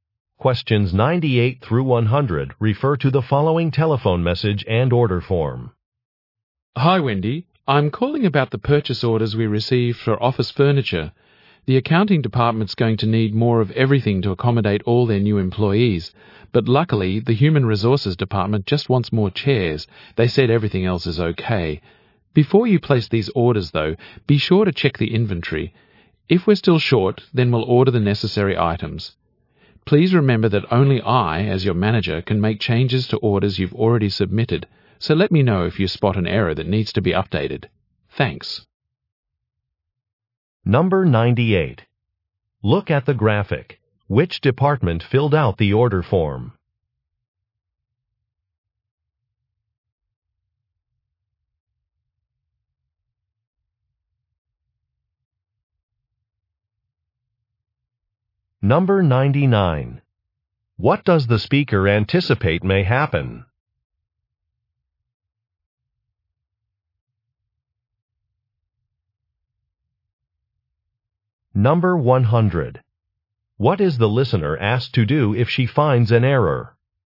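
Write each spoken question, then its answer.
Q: What is the listener asked to do if she finds an error?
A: Tell the manager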